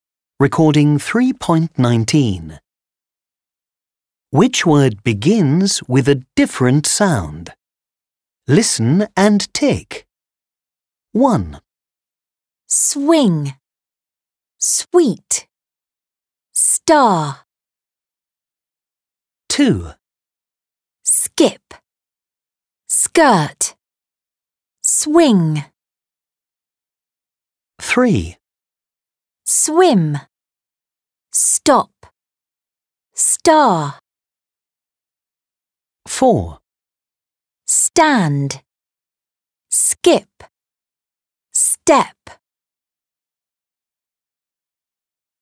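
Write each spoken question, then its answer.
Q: Skip. Skirt. Swing.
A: Swing

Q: Swim. Stop. Star.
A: Swim

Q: Stand. Skip. Step.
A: Skip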